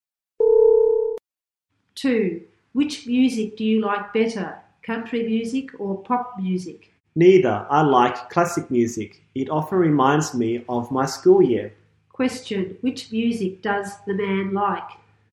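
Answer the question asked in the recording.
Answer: Classic music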